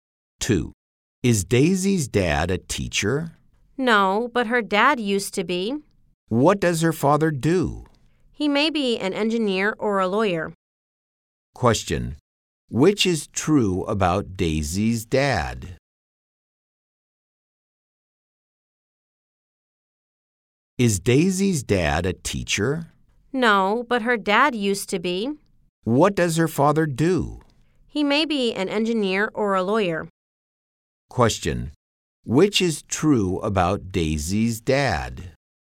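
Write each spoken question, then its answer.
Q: Which is true about Daisy's dad?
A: He used to be a teacher.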